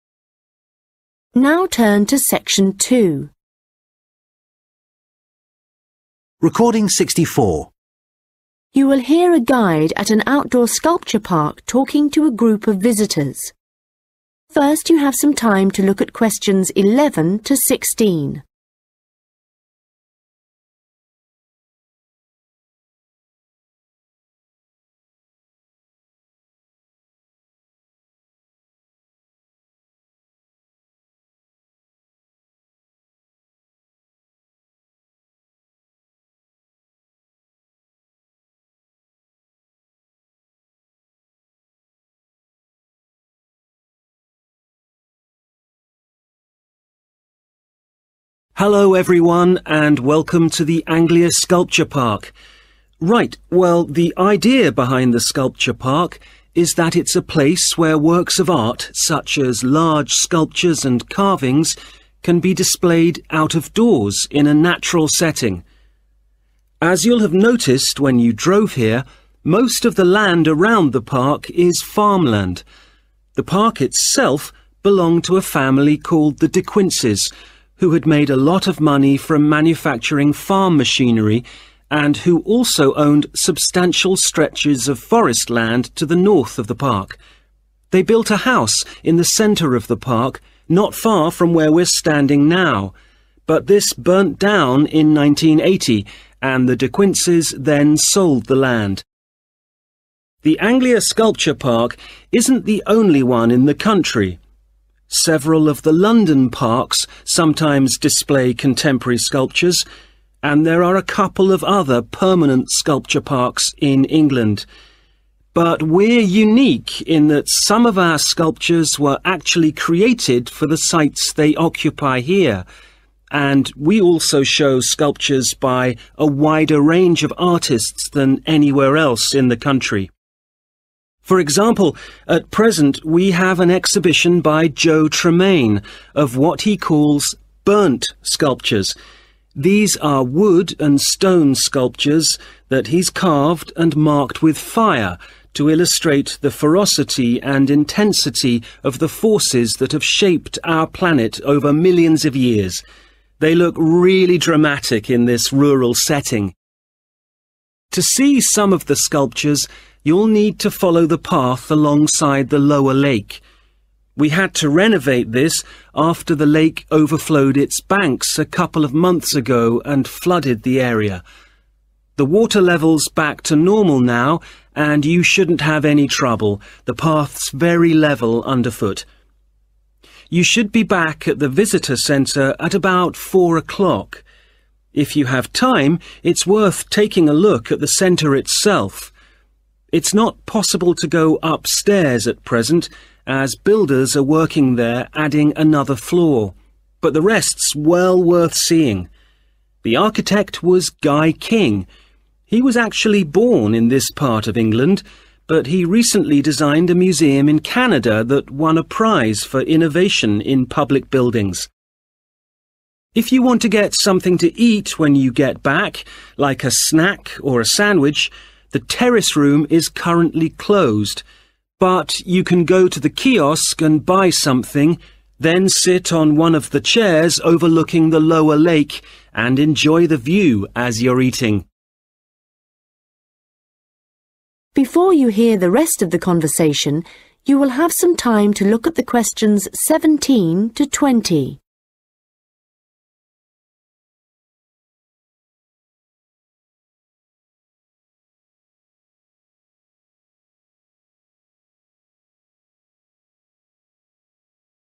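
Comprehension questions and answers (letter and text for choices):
Questions 11-16 Choose the correct letter, A, B or C.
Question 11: The land where the Sculpture Park is located was previously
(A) completely covered by forest.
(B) the site of a private house.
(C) occupied by a factory.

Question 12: What is unusual about the Anglia Sculpture Park?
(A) Artists have made sculptures especially for it.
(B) Some of its sculptures were donated by the artists.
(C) It only shows contemporary sculptures.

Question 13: What is the theme of Joe Tremain's 'burnt' sculptures?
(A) the contrast between nature and urban life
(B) the effect of man on the environment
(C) the violence of nature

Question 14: The path by the Lower Lake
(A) is rather wet in some places.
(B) has recently been repaired.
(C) is difficult to walk on.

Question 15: What does the speaker say about the Visitor Centre?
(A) It is being enlarged at present.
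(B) It has received an international award.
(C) It was designed by a Canadian architect.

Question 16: Today, visitors can buy snacks and sandwiches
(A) at the kiosk.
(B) in the Terrace Room.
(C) at the Lower Lake Cafe.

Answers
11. (B) the site of a private house.
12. (A) Artists have made sculptures especially for it.
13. (C) the violence of nature
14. (B) has recently been repaired.
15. (A) It is being enlarged at present.
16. (A) at the kiosk.

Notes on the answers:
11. They built a house in the center of the park, not far from where we're standing now, but this burnt down in 1980 and the De Quincies then sold the land (Họ xây một ngôi nhà ở trung tâm công viên, gần nơi chúng ta đang đứng bây giờ, những ngôi nhà này đã bị cháy vào năm 1980 và gia đình De Quincies sau đó đã bán mảnh đất này)
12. But we're unique in that some of our sculptures were actually created for the sites they occupy here, and we also show sculptures by a wider range of artists than anywhere else in the country. 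(Nhưng chúng tôi độc đáo ở chỗ một số tác phẩm điêu khắc của chúng tôi thực sự được tạo ra cho các địa điểm mà chúng được đặt ở đó và chúng tôi cũng trưng bày các tác phẩm điêu khắc của nhiều nghệ sĩ hơn bất kỳ nơi nào khác trên cả nước)
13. These are wood and stone sculptures that he's carved and marked with fire to illustrate the ferocity and intensity of the forces that have shaped our planet over millions of years (Đây là những tác phẩm điêu khắc bằng gỗ và đá mà anh ấy đã chạm khắc và đánh dấu bằng lửa để minh họa cho sự tàn bạo và cường độ của các thế lực đã định hình hành tinh của chúng ta trong hàng triệu năm)
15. You should be back at the Visitor Centre at about four o'clock. If you have time it's worth taking a look at the Centre itself. It's not possible to go upstairs at present as builders are working there adding another floor, but the rest are well worth seeing (Nếu bạn có thời gian bạn nên xem qua trung tâm. 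Hiện tại không thể lên tầng trên vì các công nhân xây dựng đang làm việc ở đó để thêm một tầng khác, tuy nhiên những phần còn lại cũng rất đáng xem)
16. If you want to get something to eat when you get back, like a snack or a sandwich, the Terrace Room is currently closed, but you can go to the kiosk and buy something, then sit on one of the chairs overlooking the Lower Lake and enjoy the view as you're eating (Nếu bạn muốn ăn gì đó khi quay lại, chẳng hạn như đồ ăn nhẹ hoặc bánh sandwich, Phòng Terrace hiện đang đóng cửa, nhưng bạn có thể đến ki-ốt và mua thứ gì đó, sau đó ngồi trên một trong những chiếc ghế nhìn ra Hồ Hạ và ngắm cảnh khi bạn đang ăn)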